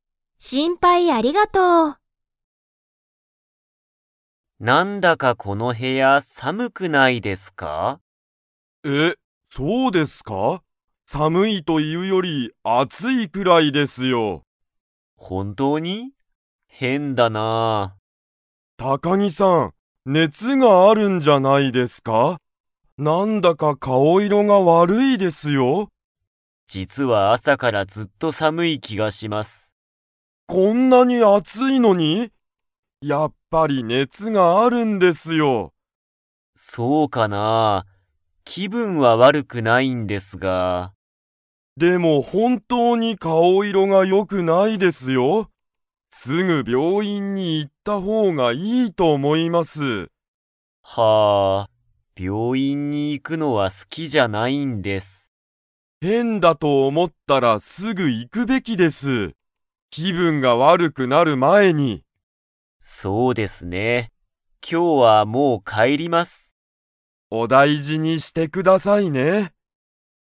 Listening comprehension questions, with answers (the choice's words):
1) 高木たかぎさんは、朝あさからずっと 気きがする。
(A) 寒さむい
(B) 怖こわい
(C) 暑あつい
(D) 楽たのしい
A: 寒さむい

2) 高木たかぎさんは、今日きょうは 。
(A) もう帰かえる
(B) まだ帰かえらない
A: もう帰かえる

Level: Level 4